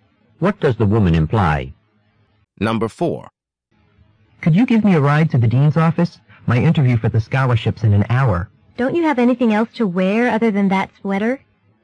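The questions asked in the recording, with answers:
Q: What does the woman imply?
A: The man should wear something more appropriate to the interview.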